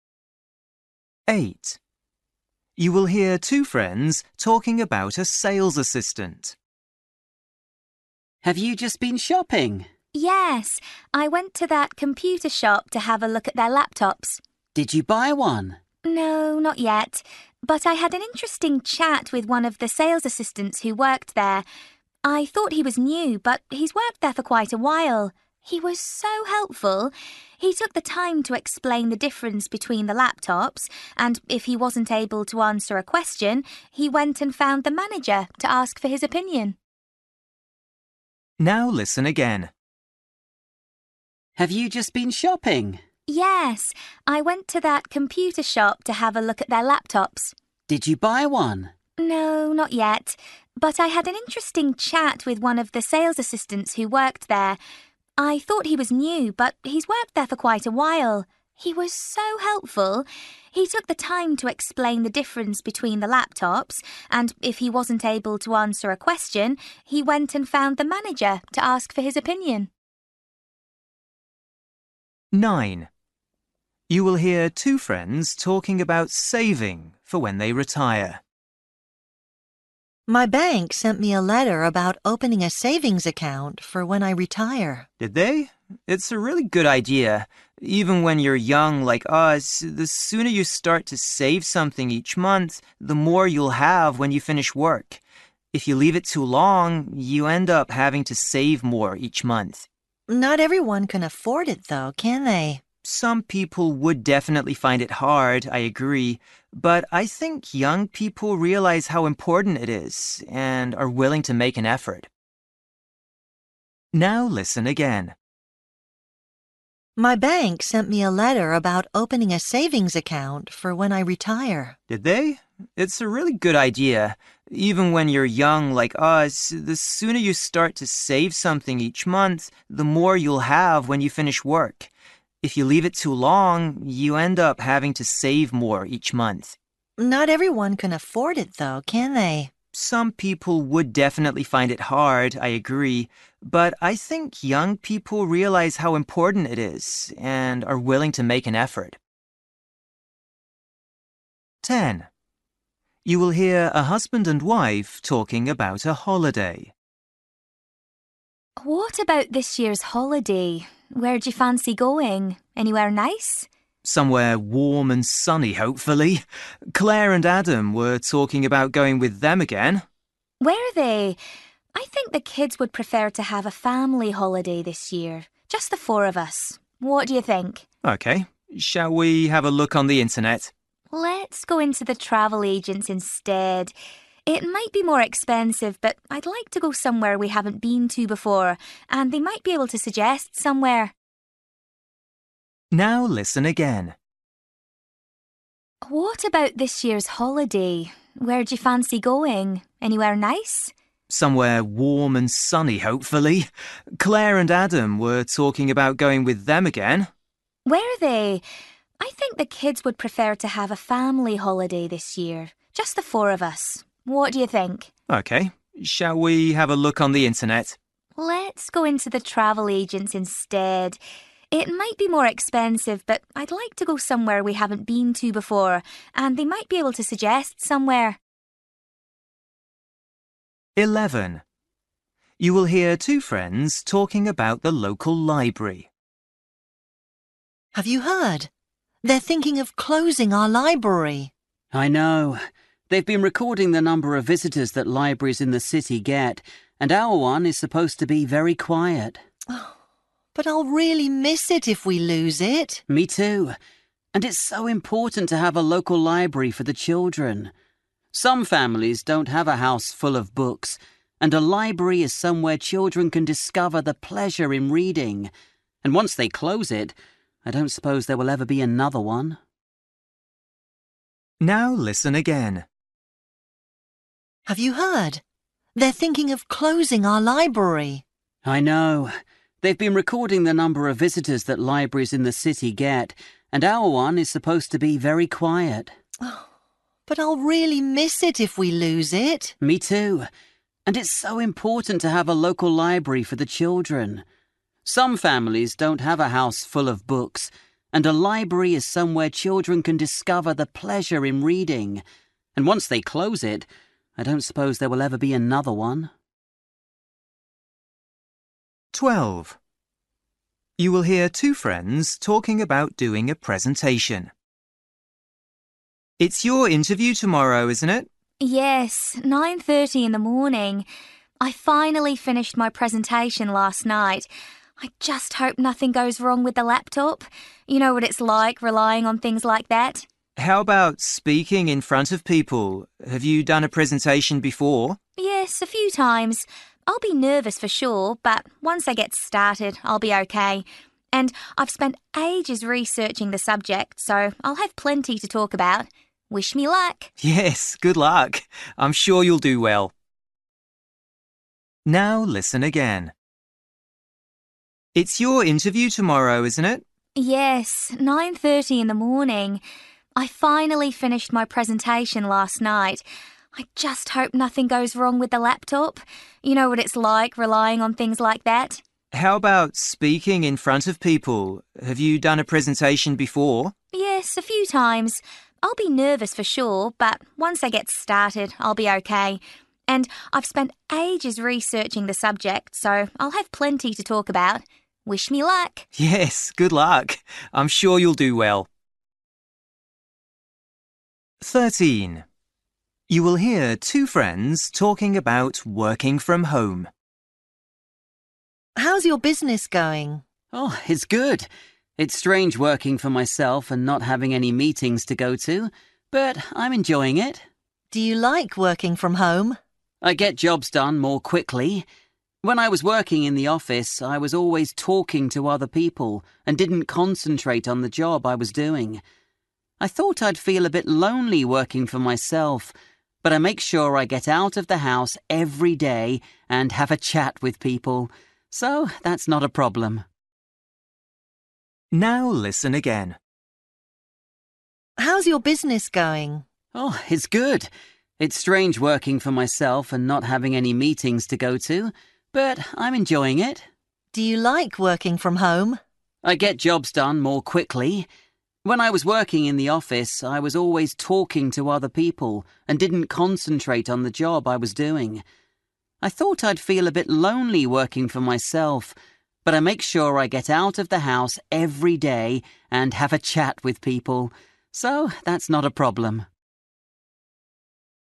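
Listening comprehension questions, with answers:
For each question, choose the correct answer.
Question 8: You will hear two friends talking about a sales assistant. The woman thinks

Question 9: You will hear two friends talking about saving for when they retire. The man thinks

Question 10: You will hear a husband and wife talking about a holiday. The woman says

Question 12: You will hear two friends talking about doing a presentation. What is the woman worried about?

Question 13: You will hear two friends talking about working from home. The man says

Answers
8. he was very helpful
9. young people are willing to make an effort to save
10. she wants to go somewhere they haven't been before
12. something going wrong with the laptop
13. he gets jobs done more quickly at home

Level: Luyện nghe trình độ B1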